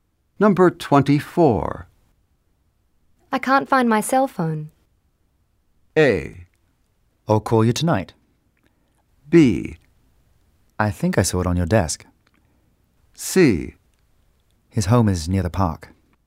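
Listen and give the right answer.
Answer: B: I think I saw it on your desk.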